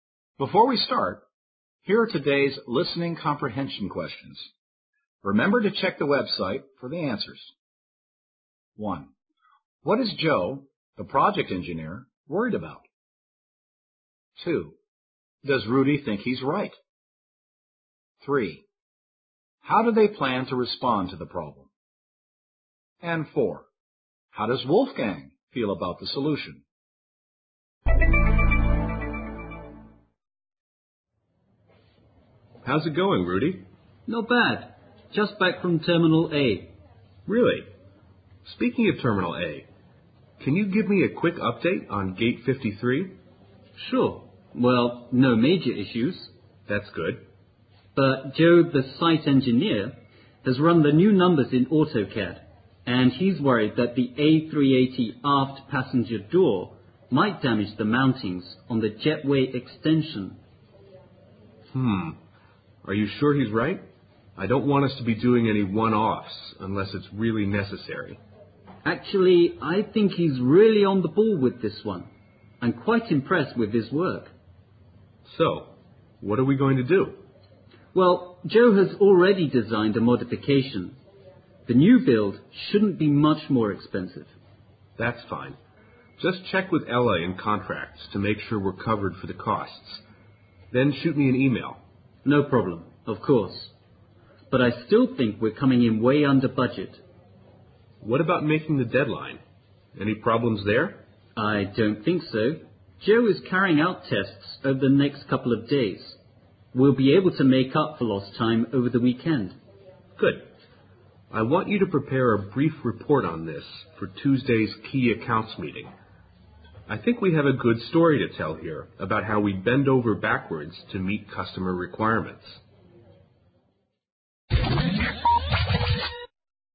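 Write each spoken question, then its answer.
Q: What is Joe, the project engineer, worried about?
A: That the A380's aft passenger door might damage the mountings on the jetway extension

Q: Does Rudy think he's right?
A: Yes, he thinks Joe is really on the ball

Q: How do they plan to respond to the problem?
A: With Joe's modification (a new build), checking with contracts that the costs are covered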